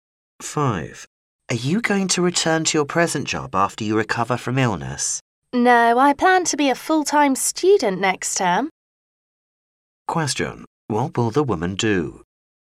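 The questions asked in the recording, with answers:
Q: What will the woman do?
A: Become a full-time student next term.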